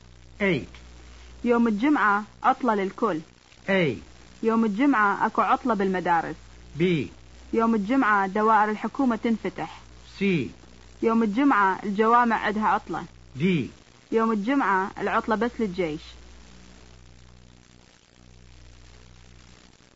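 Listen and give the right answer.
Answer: A: يوم الجمعة اكو عطلة بالمدارس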